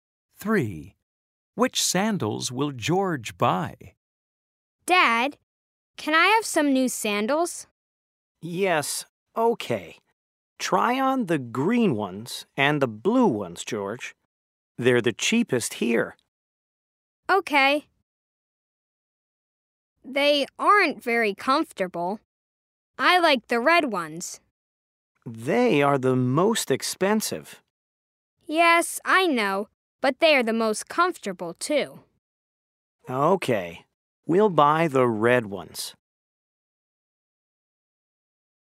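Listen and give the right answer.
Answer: The red ones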